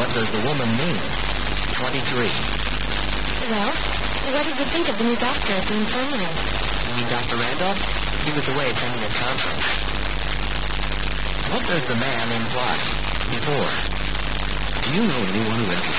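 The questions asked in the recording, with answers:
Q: What does the man imply?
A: He didn't see the new doctor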